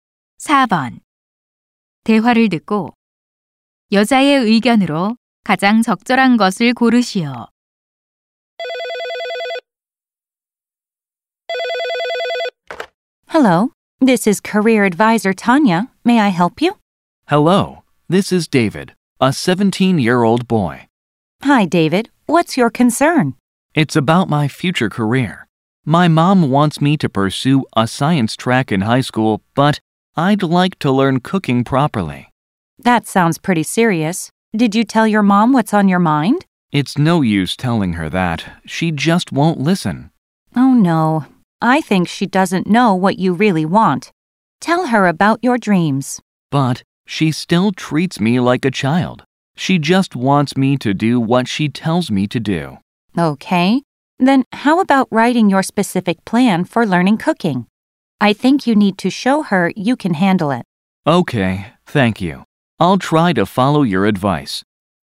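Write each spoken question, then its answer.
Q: 대화를 듣고 여자의 의견으로 가장 적절한 것을 고르시오.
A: 요리를 배우려는 구체적인 계획을 써서 엄마에게 보여 줘야 한다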